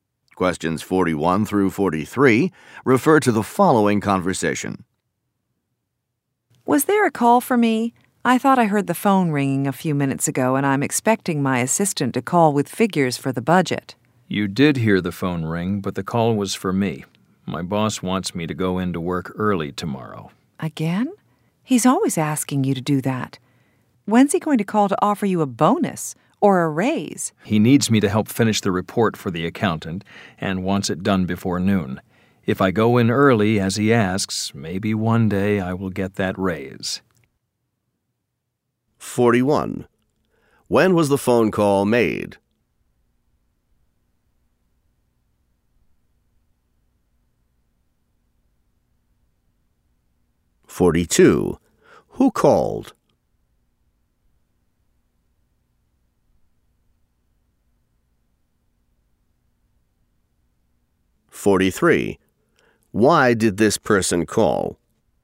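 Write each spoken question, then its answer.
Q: When was the phone call made?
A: A few minutes ago

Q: Who called?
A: The woman's boss

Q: Why did this person call?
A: To ask her to go into work early tomorrow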